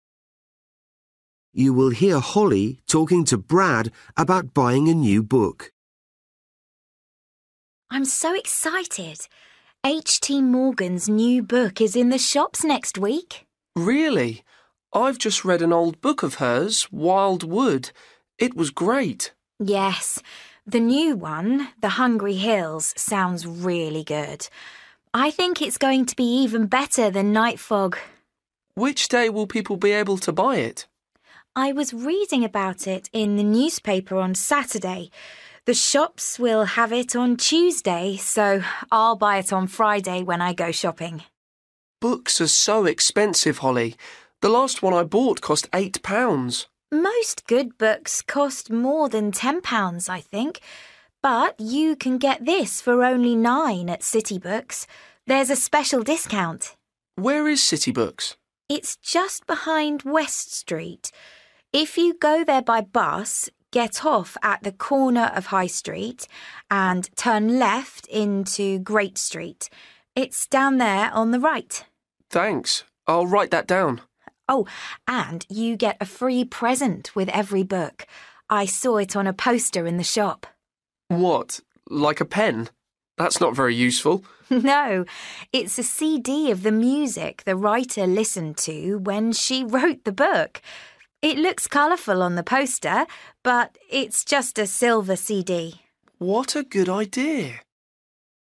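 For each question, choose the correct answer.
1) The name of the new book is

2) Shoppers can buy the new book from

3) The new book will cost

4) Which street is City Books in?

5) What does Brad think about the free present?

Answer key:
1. The Hungry Hills
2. Tuesday
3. £9
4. Great Street
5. It's a good idea

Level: Luyện nghe trình độ A2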